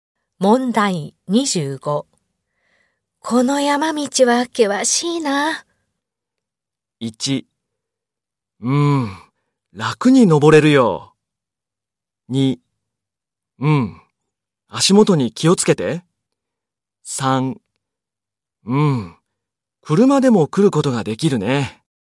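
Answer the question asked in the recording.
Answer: 2: 足元に気をつけて。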